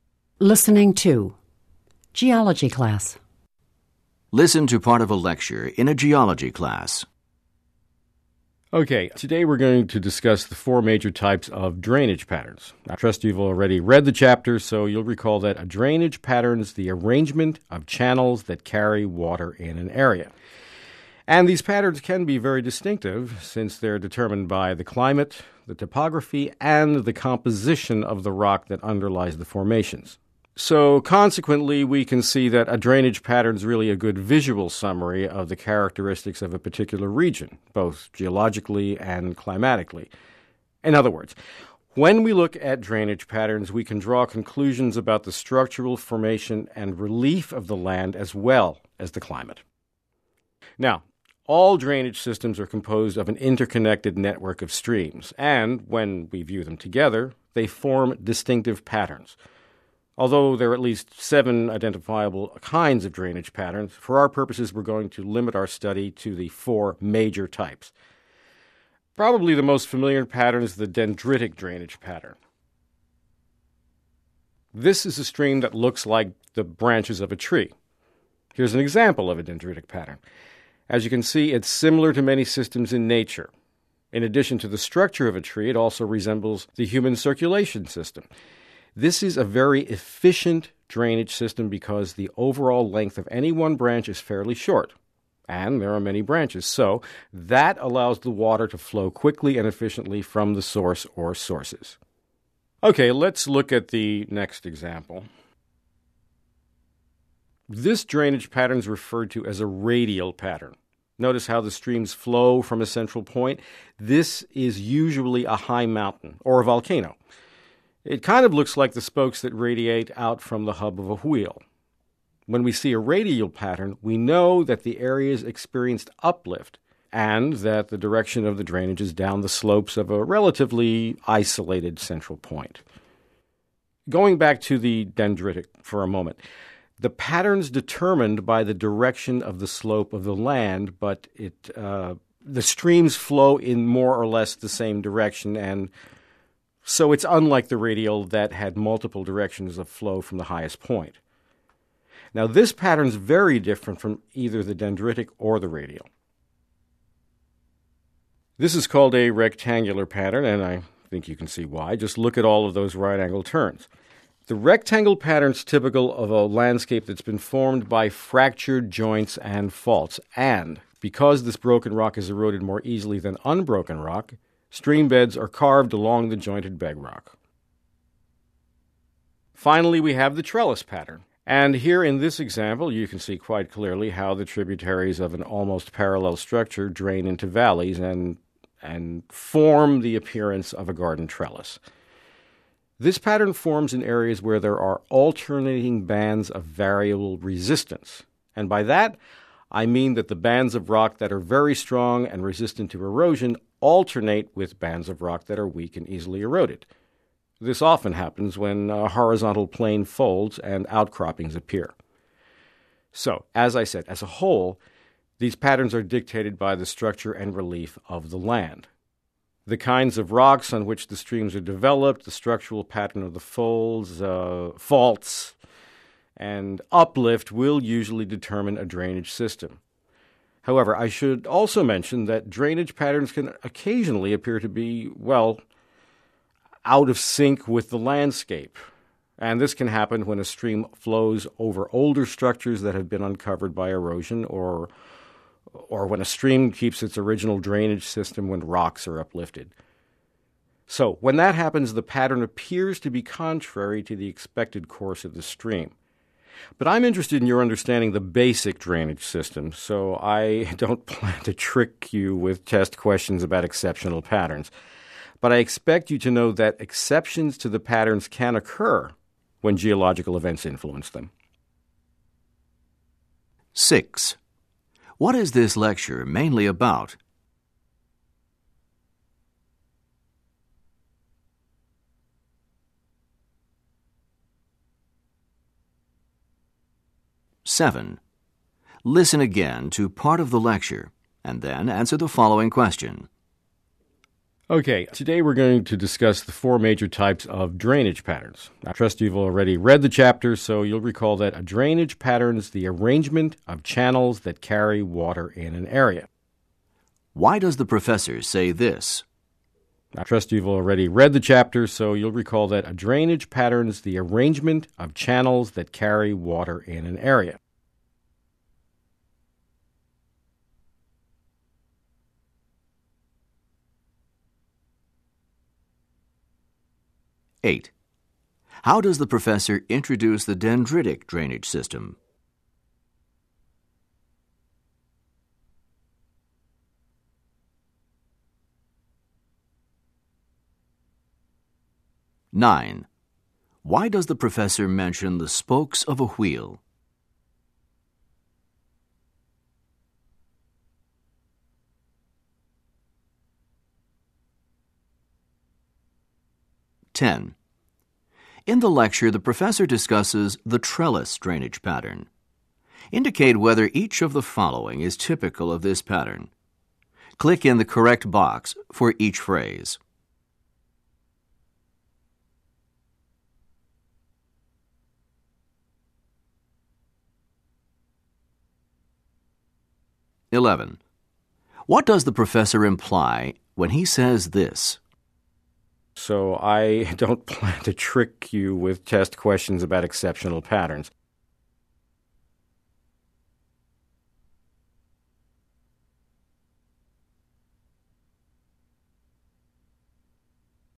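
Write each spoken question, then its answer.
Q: What is this lecture mainly about?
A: The four major types of drainage patterns

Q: Why does the professor say this?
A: To review a definition that students should know from the reading

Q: How does the professor introduce the dendritic drainage system?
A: By comparing it to the branches of a tree

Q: Why does the professor mention the spokes of a wheel?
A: To describe how the radial pattern flows out from a central point

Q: What does the professor imply when he says this?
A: The exceptional patterns will not be on the test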